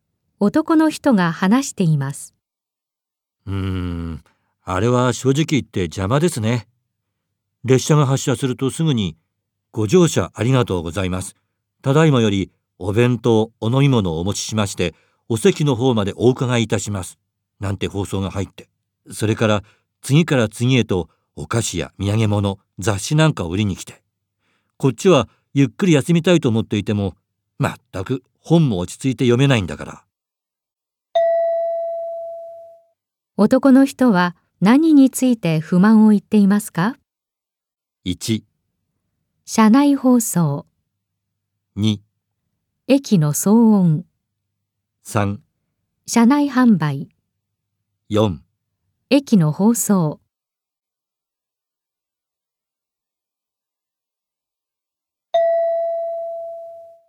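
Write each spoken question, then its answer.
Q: 男の人は何について不満を言っていますか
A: 3: 車内販売。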